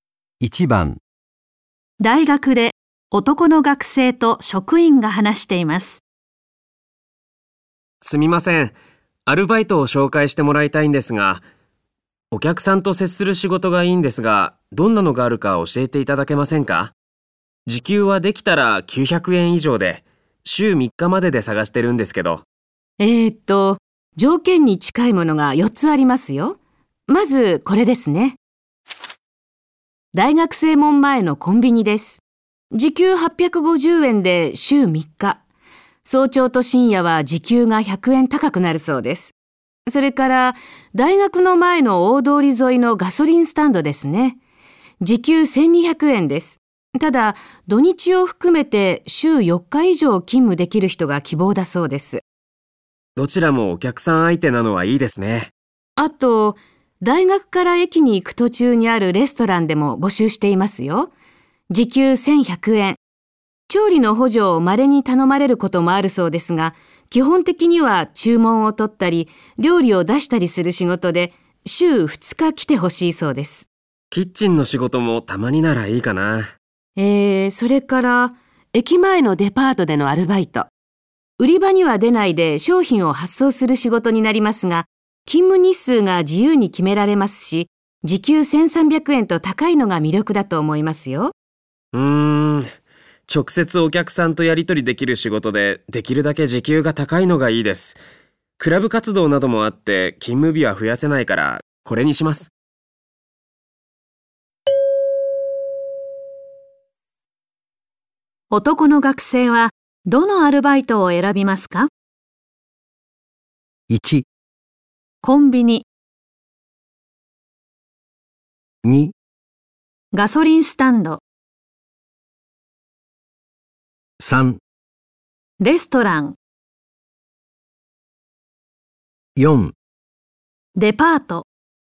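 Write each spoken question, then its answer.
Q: 男の学生は、どのアルバイトを選びますか?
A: 3: レストラン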